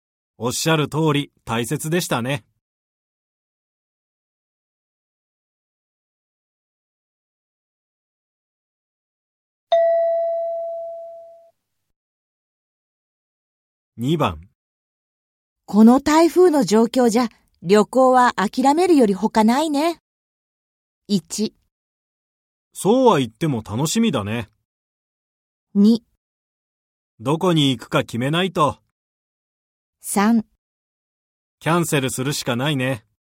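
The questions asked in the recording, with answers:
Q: この台風の状況じゃ、旅行は諦めるより他ないね。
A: 3: キャンセルするしかないね。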